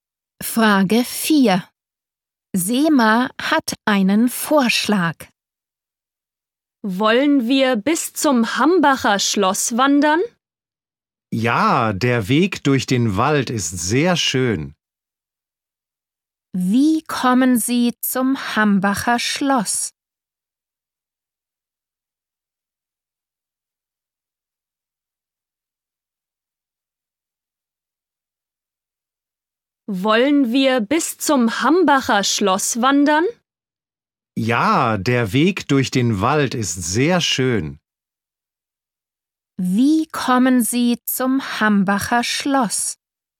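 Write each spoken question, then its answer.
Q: Wie kommen Sie zum Hambacher Schloss?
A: Zu Fuß (Wanderung durch den Wald)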